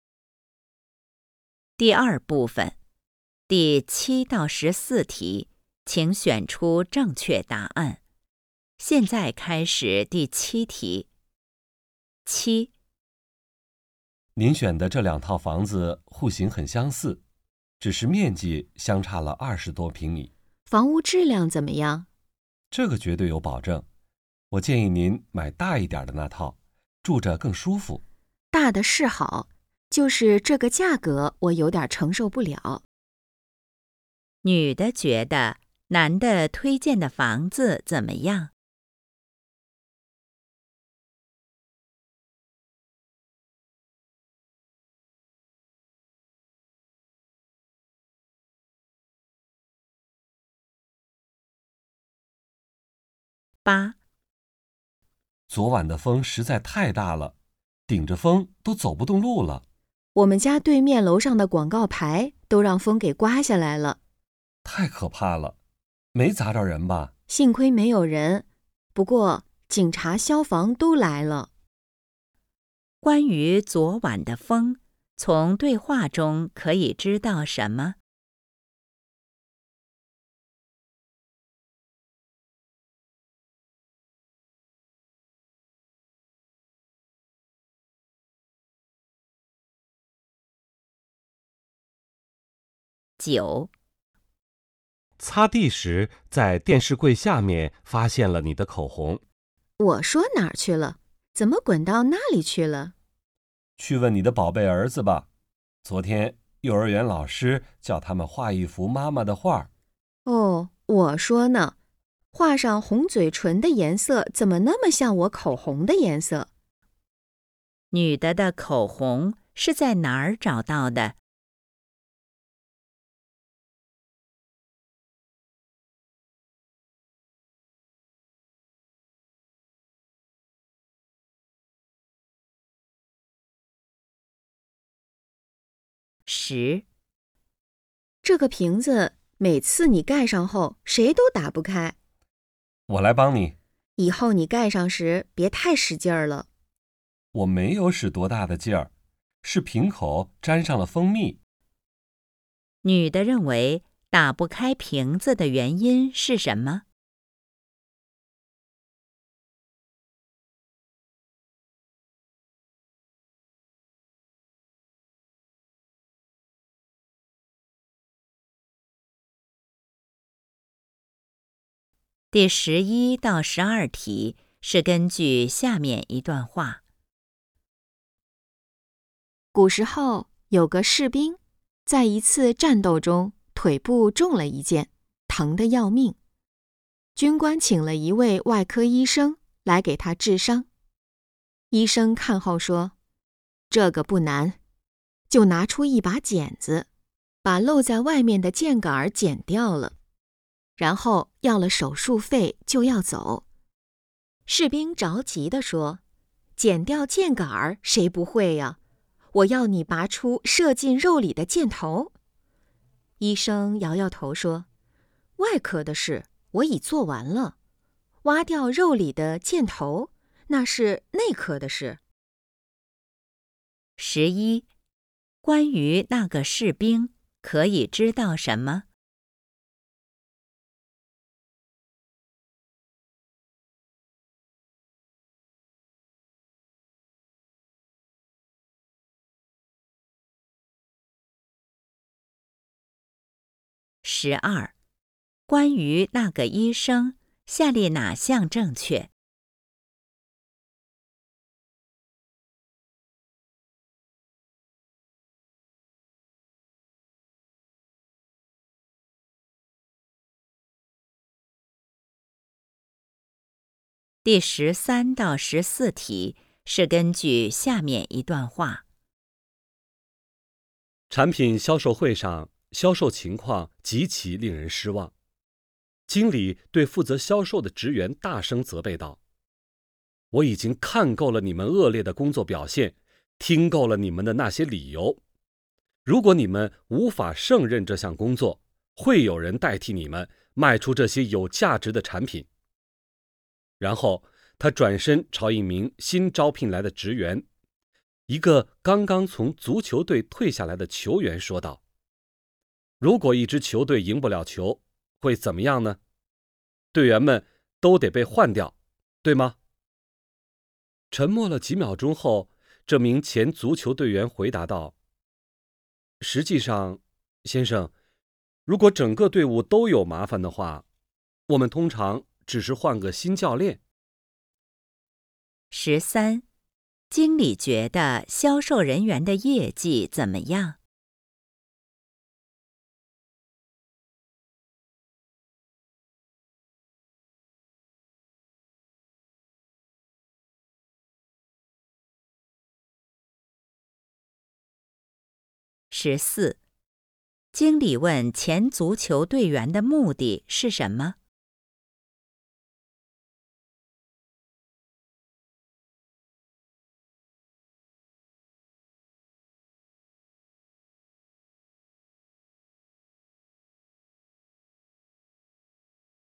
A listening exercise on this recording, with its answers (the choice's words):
第7-14题:请选择出正确答案。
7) 女的觉得男的推荐的房子怎么样?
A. 户型不够好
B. 质量没保证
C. 面积不够用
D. 价钱有点儿贵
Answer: 价钱有点儿贵

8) 关于昨晚的风,从对话中可以知道什么?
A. 造成了堵车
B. 风力不太大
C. 刮坏了广告牌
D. 整整刮了一夜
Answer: 刮坏了广告牌

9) 女的的口红是在哪儿找到的?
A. 幼儿园里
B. 电视柜下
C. 儿子书包里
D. 老师书桌上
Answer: 电视柜下

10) 女的认为打不开瓶子的原因是什么?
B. 男的盖得太紧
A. 自己手没劲儿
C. 瓶子设计有问题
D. 瓶口沾上了蜂蜜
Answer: 男的盖得太紧

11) 关于那个士兵,可以知道什么?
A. 眼睛瞎了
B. 腿受伤了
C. 快要死了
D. 胳膊断了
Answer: 腿受伤了

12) 关于那个医生,下列哪项正确?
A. 责任心很强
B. 没收手术费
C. 没解决问题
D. 医术很高明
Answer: 没解决问题

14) 经理问前足球队员的目的是什么?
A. 想跟他开个玩笑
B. 想当足球队的教练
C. 想考察他的业务能力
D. 想吓吓那些销售人员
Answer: 想吓吓那些销售人员

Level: HSK 5